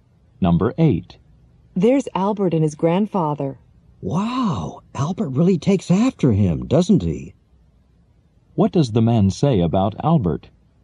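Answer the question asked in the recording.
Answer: Albert looks like his grandfather.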